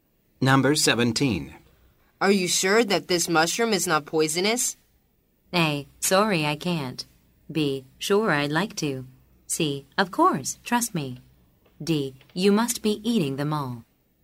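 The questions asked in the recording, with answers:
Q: Are you sure that this mushroom is not poisonous?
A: C: Of course, trust me.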